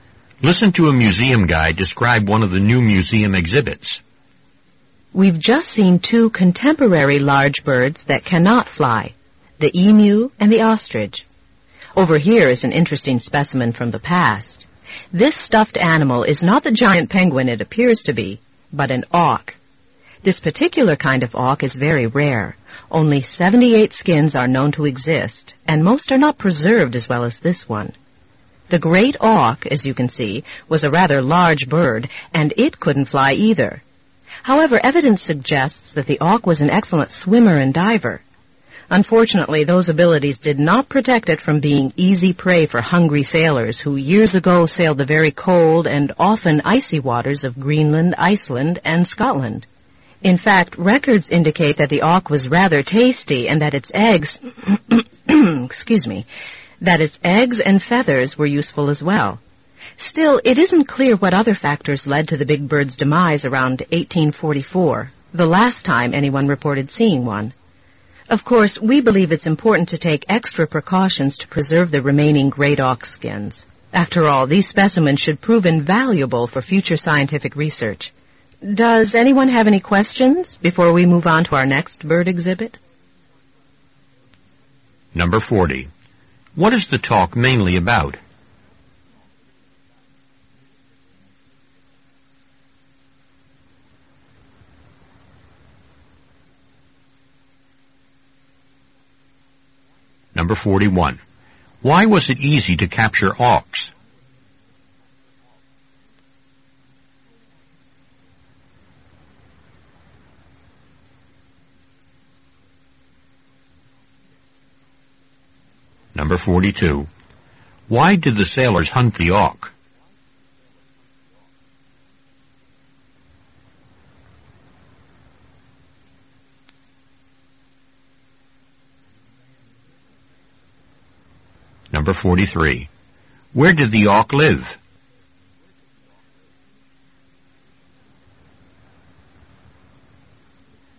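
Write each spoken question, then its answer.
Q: What is the talk mainly about?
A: The great auk, a rare extinct flightless bird

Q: Why did the sailors hunt the auk?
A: For food (it was tasty), and for its eggs and feathers

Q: Where did the auk live?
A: In the cold waters around Greenland, Iceland and Scotland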